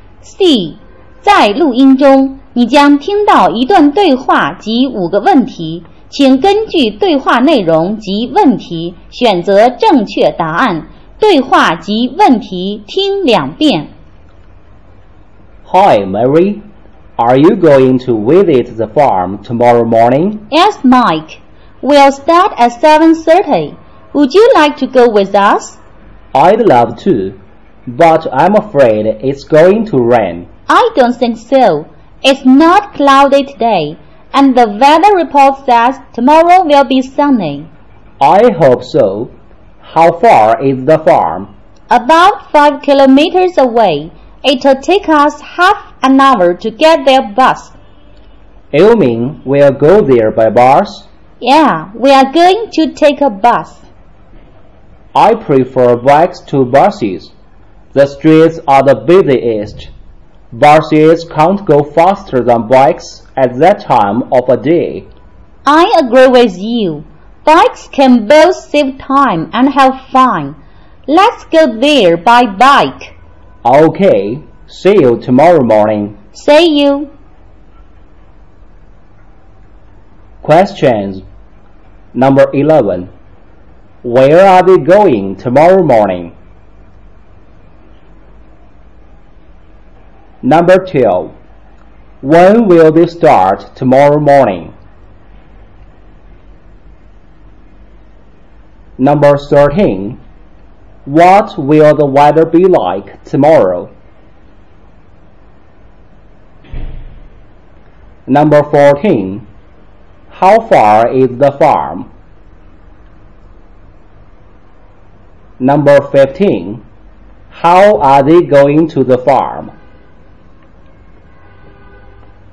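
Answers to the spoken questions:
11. To the farm
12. At 7:30
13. Sunny
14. About 5 kilometers away
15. By bike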